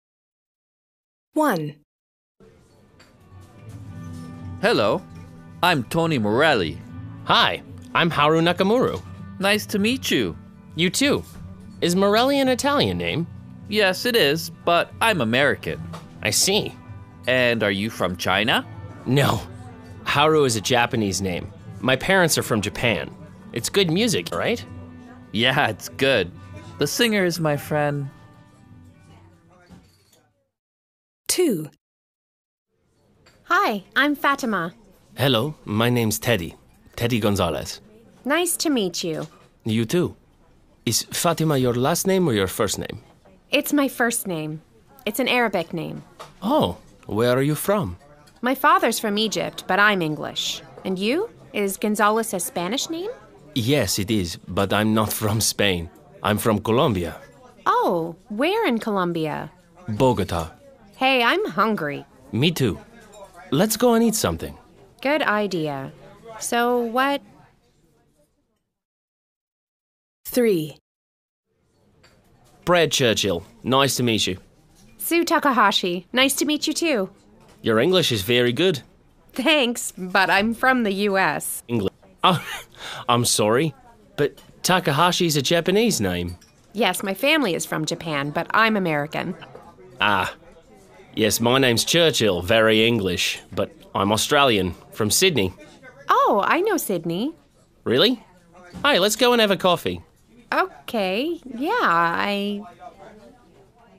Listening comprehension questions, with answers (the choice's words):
C. Listen again and write the missing words.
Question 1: A: Yeah, it's ______.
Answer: good

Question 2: A: It's my ______ name.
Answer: first

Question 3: B: Me too. Let's go and ______ something.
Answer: eat

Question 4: B: Thanks, but I'm from the ______.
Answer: US, sorry

B. Listen again. Who talks about food (F), drink (D), music (M)?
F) food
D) drink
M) music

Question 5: Speaker 1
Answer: music

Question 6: Speaker 2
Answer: food

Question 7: Speaker 3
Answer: drink

A. Listen and look at the name of people at the festival. What nationality are the people?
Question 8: Morelli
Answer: American

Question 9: Haru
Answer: Japanese

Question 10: Fatimah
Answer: English

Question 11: Takahashi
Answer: American

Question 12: Churchill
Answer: Australian

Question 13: Gonzales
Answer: Colombian